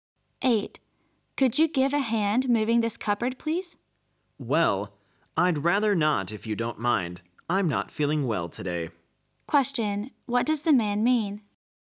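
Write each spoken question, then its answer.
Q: what does the man mean?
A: He doesn't want to help because he is not feeling well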